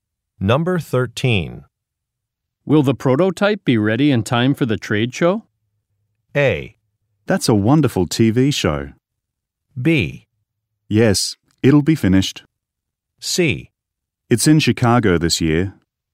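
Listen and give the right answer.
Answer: B: Yes, it'll be finished.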